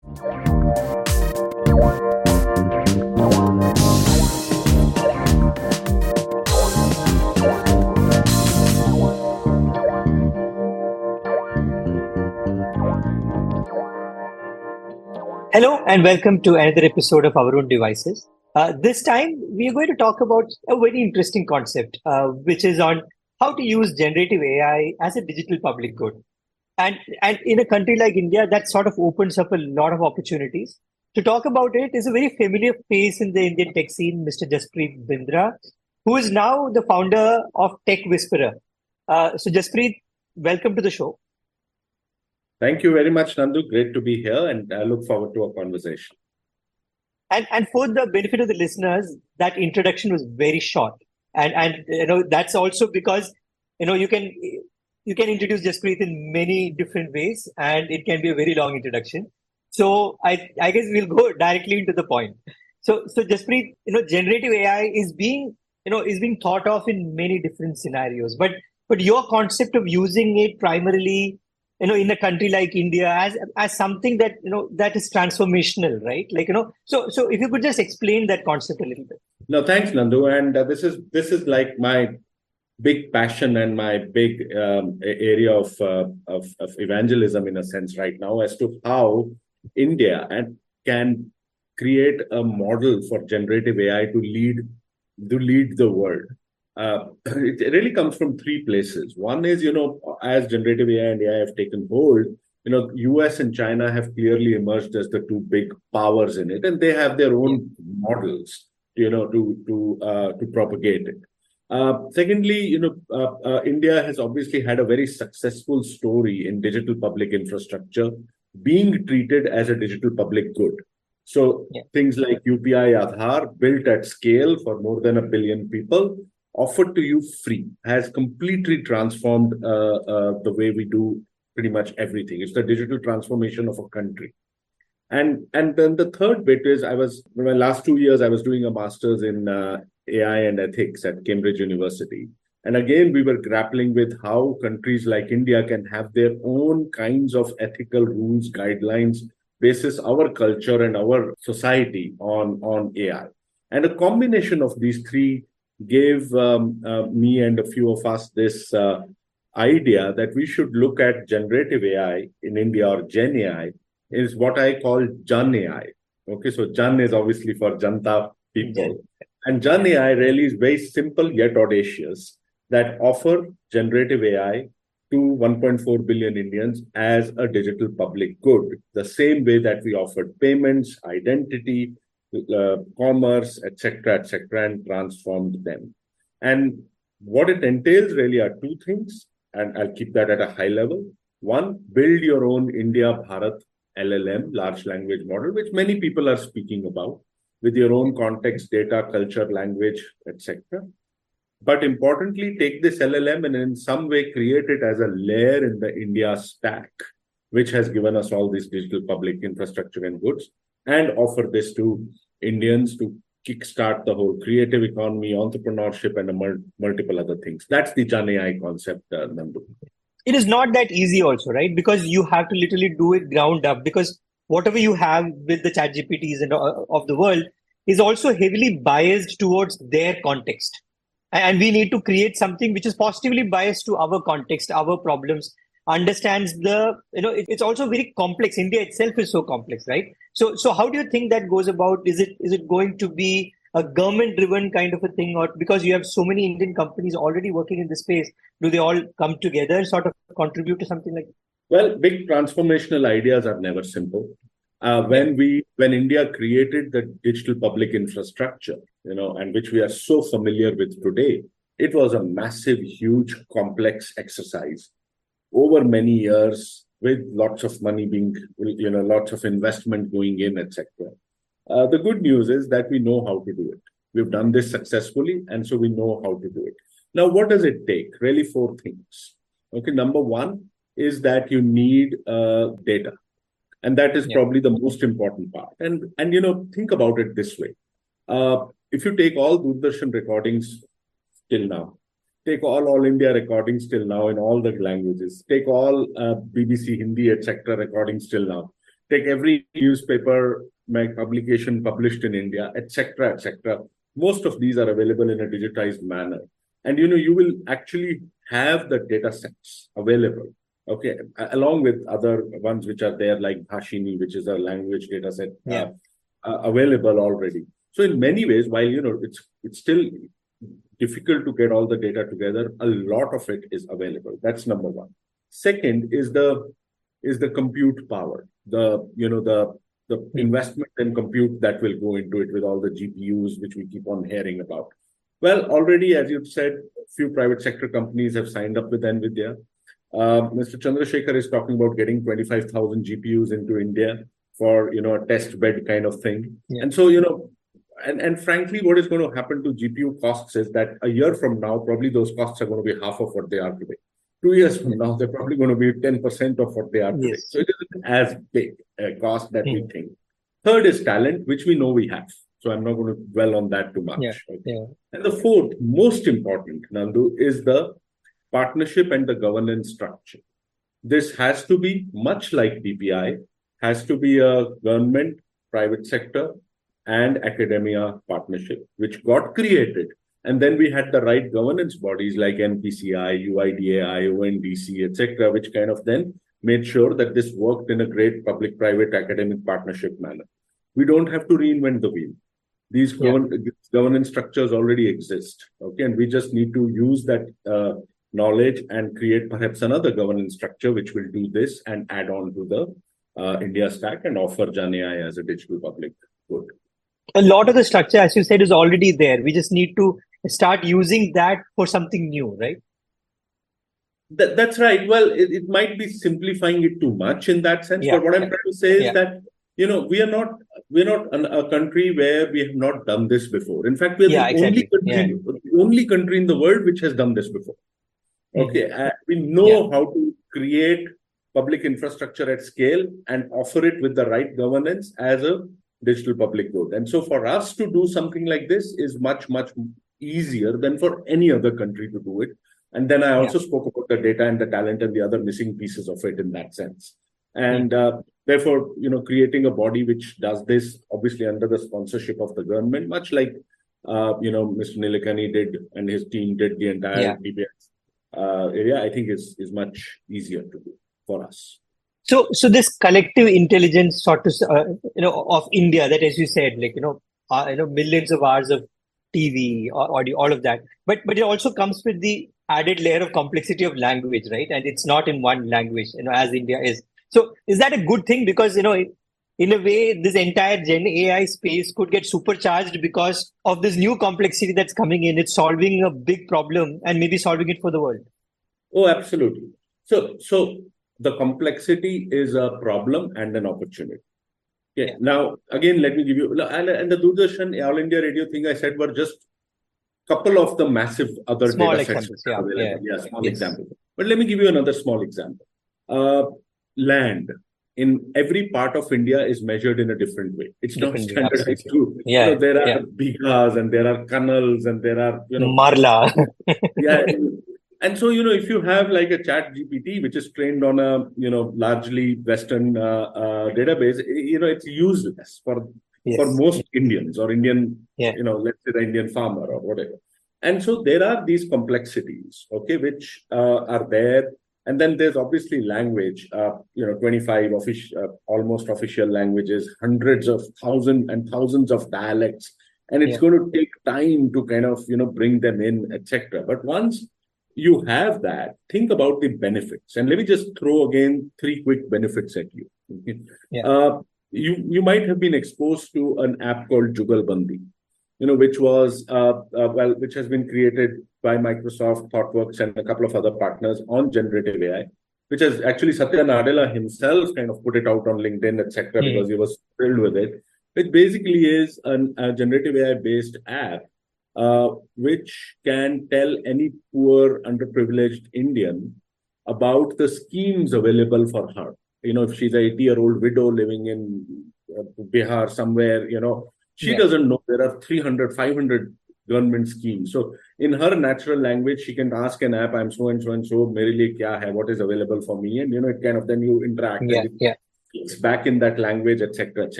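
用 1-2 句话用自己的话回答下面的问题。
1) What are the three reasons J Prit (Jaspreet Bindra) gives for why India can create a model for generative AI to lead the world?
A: The US and China have emerged as the two big AI powers with their own models; India's success with digital public infrastructure (UPI, Aadhaar) as a digital public good; and his AI ethics studies at Cambridge, about India needing its own ethical rules based on its culture and society.

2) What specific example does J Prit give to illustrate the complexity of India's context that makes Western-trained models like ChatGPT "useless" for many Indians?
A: Land is measured in a different way in every part of India (bigas, canals, marla), so a ChatGPT trained on mostly Western data is useless for someone like an Indian farmer.

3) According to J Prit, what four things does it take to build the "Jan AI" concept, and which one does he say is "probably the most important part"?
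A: Data, compute power (GPUs), talent, and partnership and governance structure; data is probably the most important part.

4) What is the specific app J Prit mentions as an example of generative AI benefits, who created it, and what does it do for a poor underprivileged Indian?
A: Jugalbandi, made by Microsoft, ThoughtWorks and partners; it tells poor, underprivileged Indians in their own language which government schemes are available to them.

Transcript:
Hello, and welcome to another episode of our own devices.
This time, we are going to talk about a very interesting concept, which is on how to use
generative AI as a digital public good and in a country like India, that sort of opens
[Music] [Music] hello and welcome to another episode of our own devices uh this time we going to talk about a very interesting concept uh which is on how to use generative AI as a digital public good and and in a country like India that sort of opens up a lot of opportunities to talk about it is a very familiar face in the Indian tech scene Mr jpr bindra who is now the founder of tech Whisperer uh so J prit welcome to the welcome to the show
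thank you very much nandu great to be here and I look forward to our conversation and and for the benefit of the listeners that introduction was very short and and you know that's also because you know you can you can introduce J in many different ways and it can be a very long introduction so so I I guess we'll go directly into the point so so just prit you know generative AI is being you know is being thought of in many different scenarios but but your
concept of using it primarily you know in a country like India as as something that you know that is transformational right like you know so so if you could just explain that concept a little bit no thanks nandu and this is this is like my big passion and my big um area of of of evangelism in a sense right now as to how in India and can create a model for generative AI to lead to lead the world uh really comes from three places one is
you know as generative a and have taken hold you know us and China have clearly emerged as the two big powers in it and they have their own models you know to to uh to propagate it uh secondly you know India has obviously had a very successful story in digital public infrastructure being treated as a digital public good so things like UPI Adar built at scale for more than a billion people offered to you free has completely transformed uh uh the way we do pretty much
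everything it's the digital transformation of a country and and then the third bit is I was my last two years I was doing a masters in uh Ai and ethics at Cambridge University and again we were grappling with how countries like India can have their own kinds of ethical rules guidelines based is our culture and our society on on AI and a combination of these three gave um me and a few of us this uh idea that we should look at generative AI in India or
geni is what I call Ji okay so Jan is obviously for janta people and Jan AI really is very simple yet audacious that offer generative AI to 1.4 billion Indians as a digital public good the same way that we offered payments identity Commerce etc etc and transformed them and what it entails really are two things and I'll keep that at a high level one build your own India bat llm large language model which many people are speaking about with your own context data culture language Etc
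but importantly take this llm and in some way create it as a layer in the India stack which has given us all these digital public INF structure and goods and offer this to Indians to Kickstart the whole creative economy entrepreneurship and multiple other things that's the J concept it is not that easy also right because you have to literally do it ground up because whatever you have with the CH gpts and of the world is also heavily biased towards their context and we need to create
something which is positively biased to our context our problems understands the you know it's also very complex India itself is so complex right so so how do you think that goes about is it is it going to be a government driven kind of a thing or because you have so many Indian companies already working in the space do they all come together sort of contribute to something like well Big transformational Ideas are never simple uh when we when India created the digital public infrastructure you know
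and which we are so familiar with today it was a massive huge complex exercise over many years with lots of money being you know lots of in investment going in ETC uh the good news is that we know how to do it we've done this successfully and so we know how to do it now what does it take really four things okay number one is that you need uh data and that is probably the most important part and and you know think about it this way
uh if you take all dur dasan recordings till now take all all India recordings till now in all the languages take all BBC Hindi Etc recordings till now take every every newspaper publication published in India etc etc most of these are available in a digitized manner and you know you will actually have the data sets available okay along with other ones which are there like bashini which is a language data set available already so in many ways while you know it's it's still difficult to get
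all the data together a lot of it is available that's number one second is the is the compute power the you know the you know the the investment and compute that will go into it with all the gpus which we keep on hearing about well already as you said few private sector companies have signed up with n viia u Mr Chandra shakar is talking about getting 25,000 gpus into India for you know a test bed kind of thing and so you know and and frankly what
is going to happen to GPU costs is that a year from now probably those costs are going to be half of what they are today two years from now they're probably going to be 10% of what they are today so it isn't as big a cost that we think third is Talent which we know we have so I'm not going to dwell on that too much and the fourth most important nandu is the partnership and the governance structure this has to be much like BPI has
to be a government private sector and Academia partnership which got created and then we had the right governance bodies like npci uid IC Etc which kind of then made sure that this worked in a great public private academic partnership manner we don't have to reinvent the wheel these governance structures already exist okay and we just need to use that uh knowledge and create perhaps another governance structure which will do this and add on to the uh India stack and offer Jan as a digital public good
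A lot of the structure as you said is already there we just need to start using that for something new for something new right that that's right well it might be simplifying it too much in that sense but what I'm trying to say is that you know we are not we're not a country where we have not done this before in fact we the only country only country in the world which has done this before okay we know how to create public infrastructure at scale and
Well, it might be simplifying it too much in that sense, but what I'm trying to say is that, you know, we are not, we are not an a country where we have not done this before.
In fact, we are the only country in the world which has done this before, okay?
We know how to create public infrastructure at scale and offer it with the right governance as a digital public road.
And so for us to do something like this is much, much easier than for any other country to do it.
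And then I also spoke about the data and the talent and the other missing pieces of it in that sense.
And therefore, you know, creating a body which does this obviously under the sponsorship of the government, much like, you know, Mr Nilakani did and his team did the entire DBS area, I think is, is much so.
So this collective intelligence sort of, uh, you know, of India that, as you said, like, you know, uh, you know, millions of hours of TV, audio, all of that.
But, but it also comes with the added layer of complexity of language, right?
And it's not in one language, you know, as India is.
So is that a good thing?
Because, you know, in a way, this entire gen AI space could get supercharged because of this new complexity that's coming in.
It's solving a big problem and maybe solving it for the world.
Oh, absolutely.
So.
So the complexity is a problem and an opportunity.
Okay.
Now, again, let me give you, and the, and the, and the, and the, and the, and the, and the, and the, and the and the and the and the and the and the and the and the and the and the and the and the and the and the and the and the and the and the. 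Yeah.
And so, you know, if you have like a chat GPT which is trained on a, you know, largely western, uh, uh, database, you know, it's useless for most Indians or Indian, yeah.
You know, let's say the Indian farmer or whatever.
And so there are these complexities, okay, which, uh, are there.
And then there's obviously language, uh, you know, 25 official, almost official languages, hundreds of thousand and thousands of dialects.
And it's going to take time to kind of, you know, bring them in, etc.
But once you have that, think about the benefits.
And let me just throw again, three quick benefits at you.
You, you might have been exposed to an app called jugalbandi, you know, which was, well, which has been created by Microsoft Thoughtworks and a couple of other partners on generative AI, which is actually Satya Nadella himself kind of put it out on LinkedIn, etcetera.
Because he was thrilled with it.
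It basically is an a generative AI based app, uh, which can tell any poor underprivileged Indian about the schemes available for her, you know, if she's a 80 year old widow living in Bihar somewhere, you know, she doesn't know there are 300, 500 government schemes.
So in her natural language, she can ask an app, I'm so and so and so merrily, yeah, have what is available for me.
And, you know, it kind of then you interact. Yeah, yeah, it's back in that language, etc, etc.

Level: CEFRB2-C1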